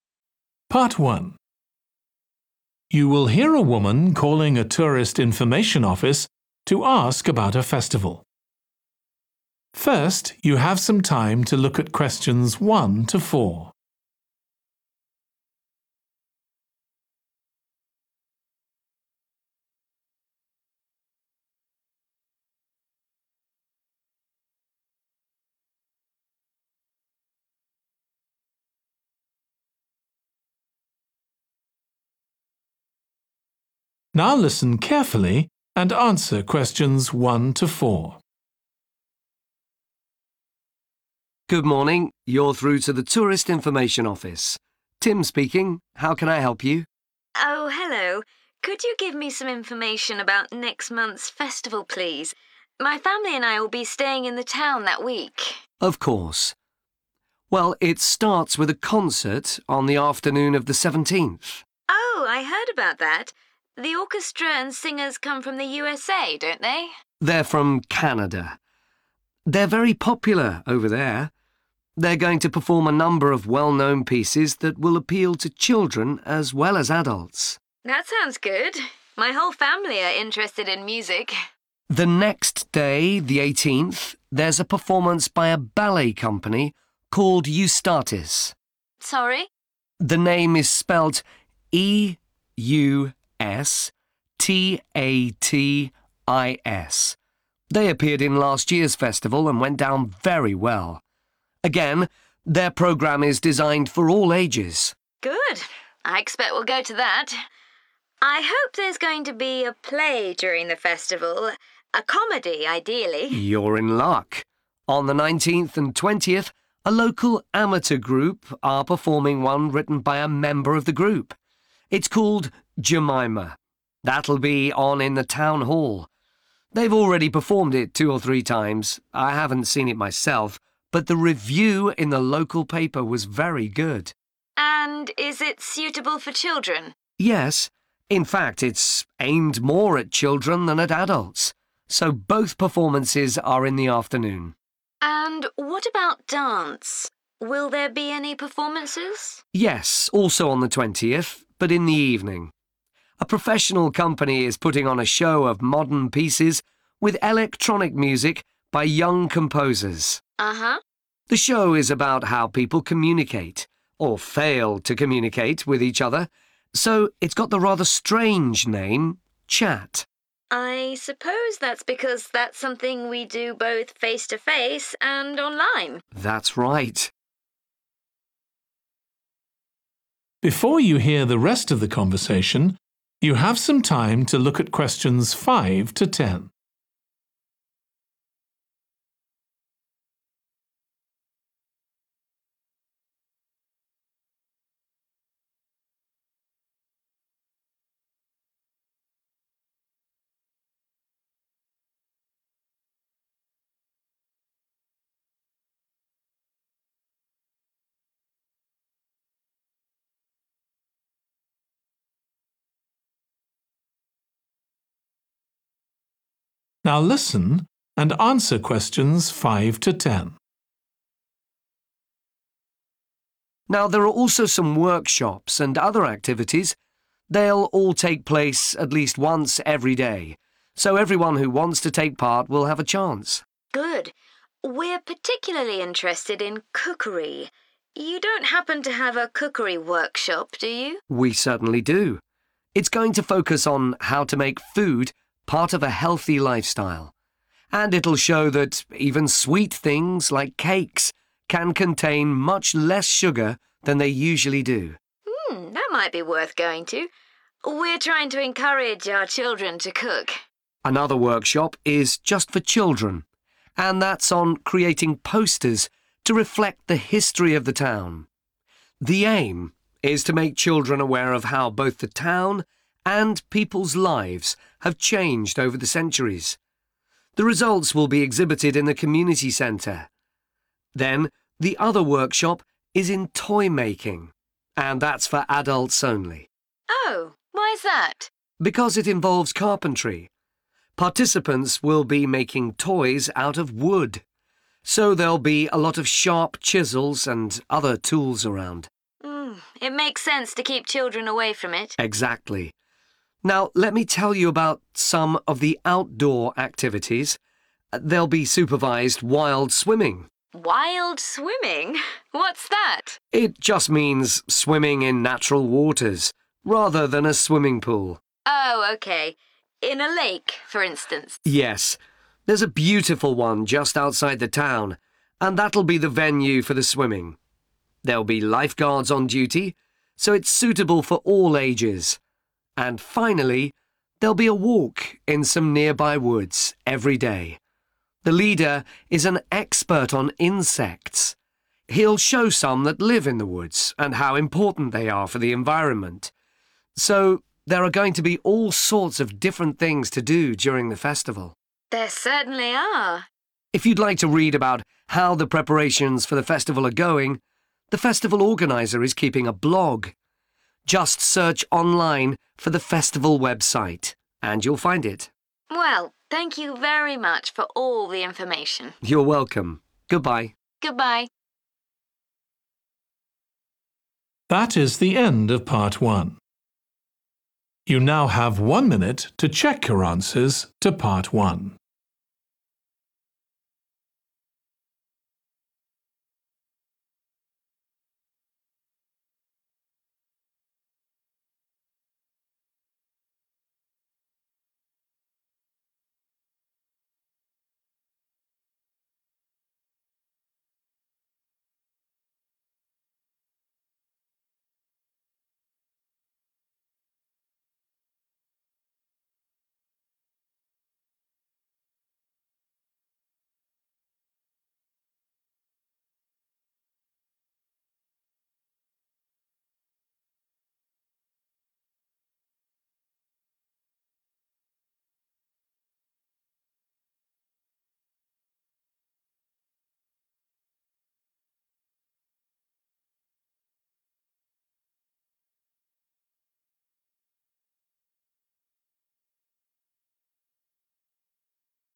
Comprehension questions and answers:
Complete the table below. Write ONE WORD ONLY for each answer.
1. company called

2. type of play: a comedy called Jemima has had a good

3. a _____ show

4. show is called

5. Making _____ food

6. (children only) Making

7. (adults only) Making toys from _____ using various tools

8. Swimming in the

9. Walking in the woods, led by an expert on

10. See the festival organiser's _____ for more information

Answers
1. Eustatis
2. review
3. dance
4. Chat
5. healthy
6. posters
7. wood
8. lake
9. insects
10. blog

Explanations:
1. The correct answer 'Eustatis' is the name of the ballet company because the transcript says 'a performance by a ballet company called Eustatis'
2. The correct answer 'review' is fitting because it relates to the positive evaluation mentioned in the excerpt from the local paper about the show, indicating an assessment of its quality. The review influenced the AI assistant's perception even though it hadn't seen the show.
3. The correct answer is dance because the excerpt directly mentions dance, which fits the context of the types of events happening during the festival, such as a ballet performance and a concert. The word 'dance' matches the general theme of the events listed in the table.
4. The correct answer 'Chat' aligns with the information provided in the excerpt where it mentions the show's theme about communication, which is reflected in the title 'Chat.'
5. The correct answer 'healthy' fits well because the excerpt mentions making food part of a healthy lifestyle and reducing sugar content, indicating a focus on health and well-being in the workshops at the festival.
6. The correct answer matches because the festival organizer's posters usually contain more information about the event, such as schedules, locations, and additional activities. In this case, the excerpt mentions another workshop for children making posters, implying those posters could be seen around the festival to provide more details.
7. The correct answer is 'wood' because the excerpt explains that people will be making toys with tools like chisels. These tools are used for making things out of wood.
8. The correct answer 'lake' is right because the excerpt tells us that people were swimming in a lake, matching the activity mentioned in the notes.
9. The correct answer is 'insects' because the activity is about walking in the woods led by someone who is an expert on insects.
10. The correct answer fits perfectly with the context as it aligns with the idea that more details about the festival can be obtained by visiting the festival organiser's blog, as stated in the excerpt.

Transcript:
TIM: Good morning. You're through to the tourist information office, Tim speaking. How can I help you?
JEAN: Oh hello. Could you give me some information about next month's festival, please? My family and I will be staying in the town that week.
TIM: Of course. Well it starts with a concert on the afternoon of the 17th.
JEAN: Oh I heard about that. The orchestra and singers come from the USA, don't they?
TIM: They're from Canada. They're very popular over there. They're going to perform a number of well-known pieces that will appeal to children as well as adults.
JEAN: That sounds good. My whole family are interested in music.
TIM: The next day, the 18th, there's a performance by a ballet company called Eustatis.
JEAN: Sorry?
TIM: The name is spelt E-U-S-T-A-T-I-S. They appeared in last year's festival, and went down very well. Again, their programme is designed for all ages.
JEAN: Good. I expect we'll go to that. I hope there's going to be a play during the festival, a comedy, ideally.
TIM: You're in luck! On the 19th and 20th a local amateur group are performing one written by a member of group. It's called Jemima. That'll be on in the town hall. They've already performed it two or three times. I haven't seen it myself, but the review in the local paper was very good.
JEAN: And is it suitable for children?
TIM: Yes, in fact it's aimed more at children than at adults, so both performances are in the afternoon.
JEAN: And what about dance? Will there by any performances?
TIM: Yes, also on the 20th, but in the evening. A professional company is putting on a show of modern pieces, with electronic music by young composers.
JEAN: Uh-huh.
TIM: The show is about how people communicate, or fail to communicate, with each other, so it's got the rather strange name, Chat.
JEAN: I suppose that's because that's something we do both face to face and online.
TIM: That's right.
TIM: Now there are also some workshops and other activities. They'll all take place at least once every day, so everyone who wants to take part will have a chance.
JEAN: Good. We're particularly interested in cookery – you don't happen to have a cookery workshop, do you?
TIM: We certainly do. It's going to focus on how to make food part of a healthy lifestyle, and it'll show that even sweet things like cakes can contain much less sugar than they usually do.
JEAN: That might be worth going to. We're trying to encourage our children to cook.
TIM: Another workshop is just for children, and that's on creating posters to reflect the history of the town. The aim is to make children aware of how both the town and people's lives have changed over the centuries. The results will be exhibited in the community centre. Then the other workshop is in toy-making, and that's for adults only.
JEAN: Oh, why's that?
TIM: Because it involves carpentry – participants will be making toys out of wood, so there'll be a lot of sharp chisels and other tools around.
JEAN: It makes sense to keep children away from it.
TIM: Exactly. Now let me tell you about some of the outdoor activities. There'll be supervised wild swimming ...
JEAN: Wild swimming? What's that?
TIM: It just means swimming in natural waters, rather than a swimming pool.
JEAN: Oh OK. In a lake, for instance.
TIM: Yes, there's a beautiful one just outside the town, and that'll be the venue for the swimming. There'll be lifeguards on duty, so it's suitable for all ages. And finally, there'll be a walk in some nearby woods every day. The leader is an expert on insects. He'll show some that live in the woods, and how important they are for the environment. So there are going to be all sorts of different things to do during the festival.
JEAN: There certainly are.
TIM: If you'd like to read about how the preparations for the festival are going, the festival organizer is keeping a blog. Just search online for the festival website, and you'll find it.
JEAN: Well, thank you very much for all the information.
TIM: You're welcome. Goodbye.
JEAN: Goodbye.